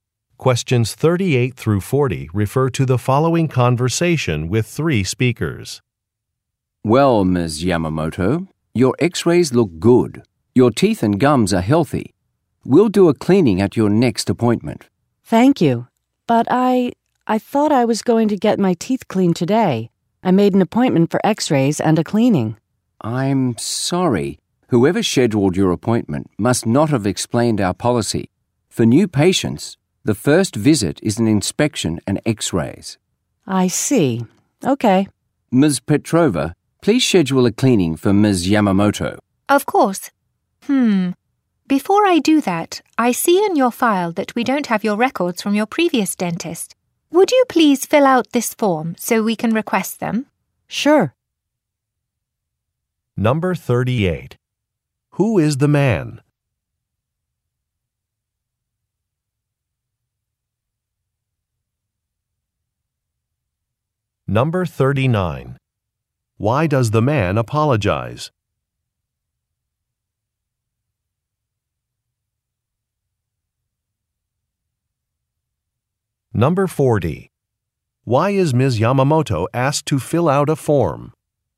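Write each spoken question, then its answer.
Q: Who is the man?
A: A dentist

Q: Why does the man apologize?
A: The office policy was not explained to her

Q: Why is Ms. Yamamoto asked to fill out a form?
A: So records from her previous dentist can be requested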